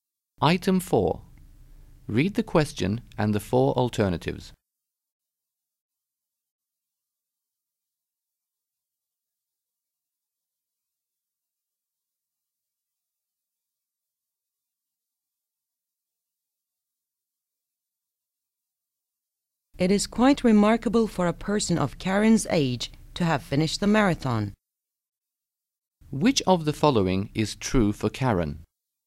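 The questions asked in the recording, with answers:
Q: Which of the following is true for Karen?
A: She finished the marathon, which is remarkable at her age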